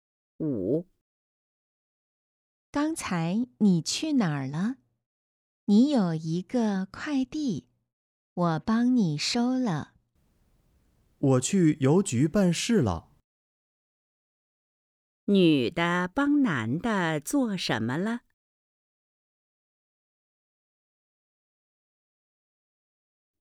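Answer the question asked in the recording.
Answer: 收快递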